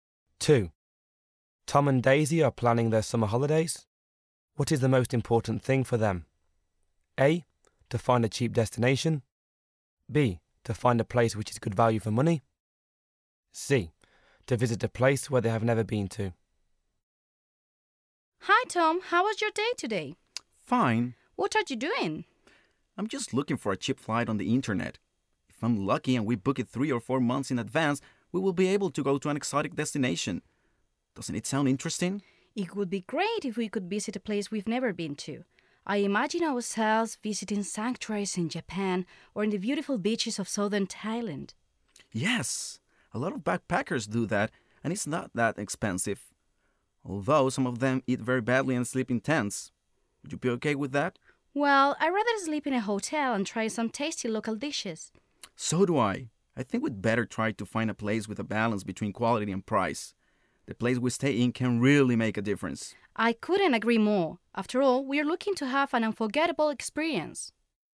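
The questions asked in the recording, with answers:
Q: What is the most important thing for them?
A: B: To find a place which is good value for money.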